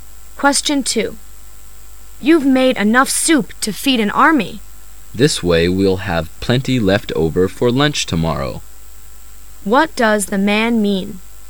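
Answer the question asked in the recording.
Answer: The extra soup can be eaten for lunch tomorrow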